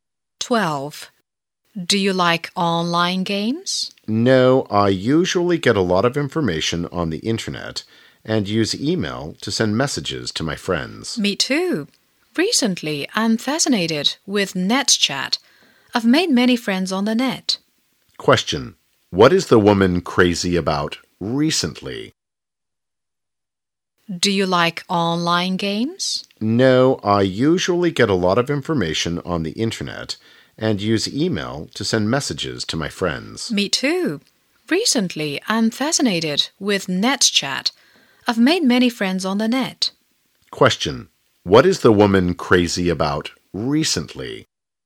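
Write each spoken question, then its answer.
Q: What is the woman crazy about recently?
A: NetChat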